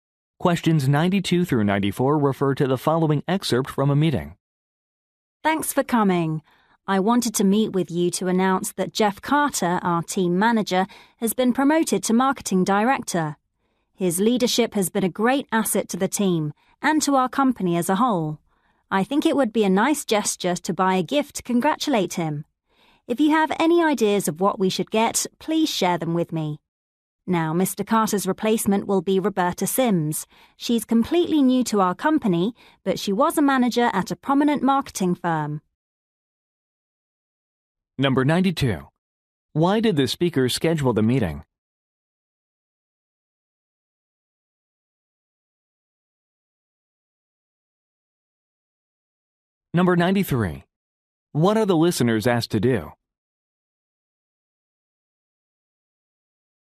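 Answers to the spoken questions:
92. To announce Jeff Carter's promotion
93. Share gift ideas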